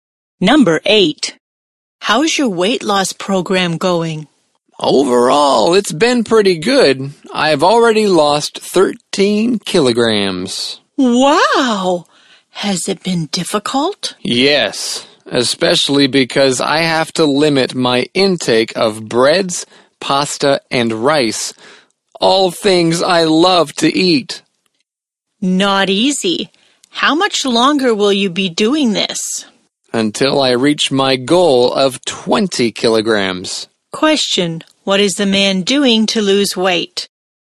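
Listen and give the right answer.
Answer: Limiting his intake of breads, pasta and rice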